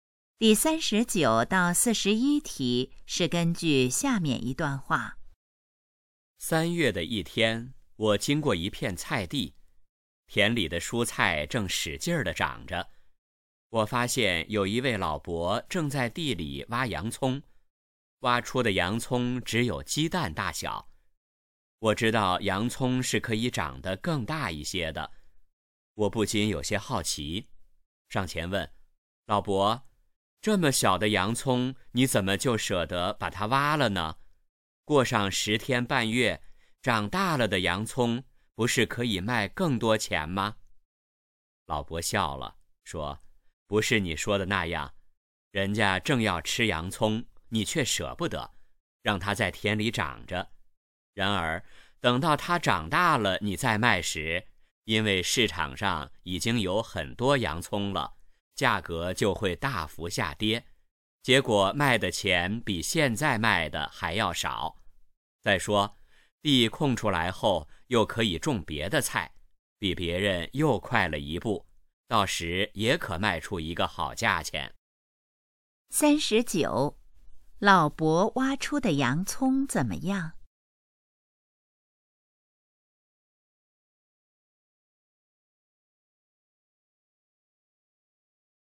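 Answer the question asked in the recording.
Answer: 很小,只有鸡蛋大小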